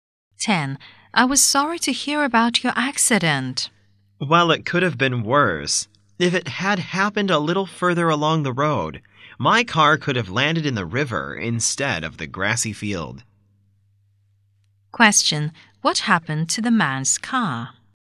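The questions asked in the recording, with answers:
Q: What happened to the man's car?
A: It landed in a grassy field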